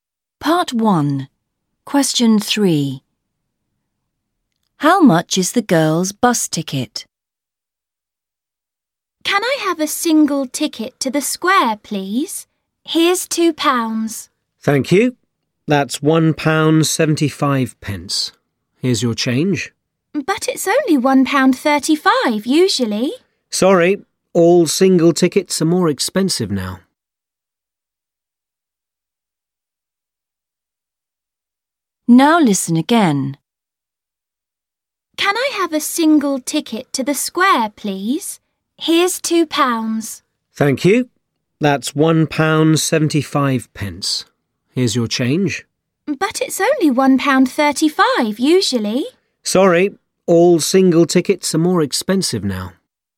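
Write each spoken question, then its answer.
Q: How much is the girl's bus ticket?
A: £1.75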